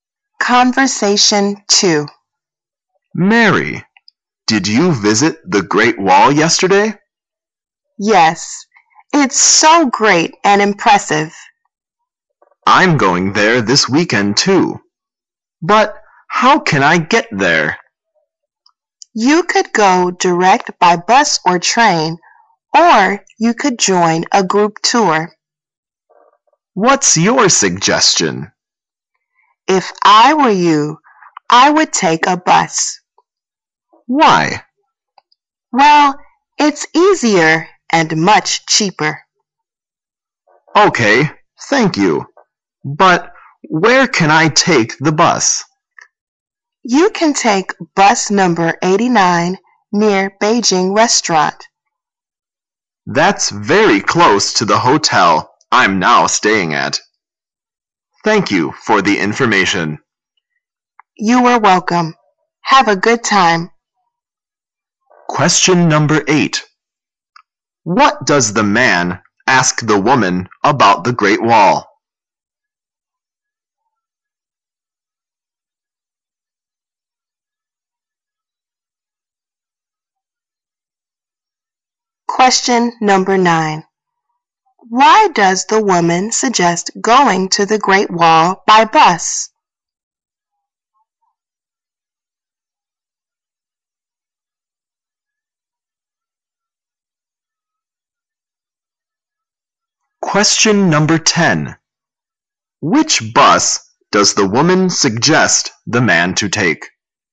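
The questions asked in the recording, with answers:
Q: What does the man ask the woman about the Great Wall?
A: How to get there

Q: Why does the woman suggest going to the Great Wall by bus?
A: It's easier and much cheaper

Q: Which bus does the woman suggest the man to take?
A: Bus number 89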